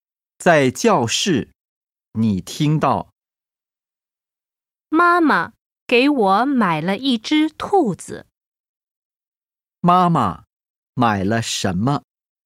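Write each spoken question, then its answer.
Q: 妈妈买了什么?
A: 一只兔子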